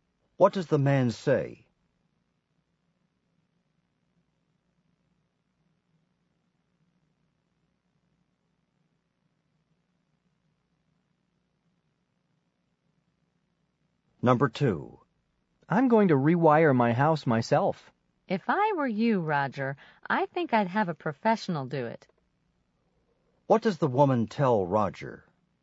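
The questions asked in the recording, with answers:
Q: What does the woman tell Roger?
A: He should have a professional rewire his house.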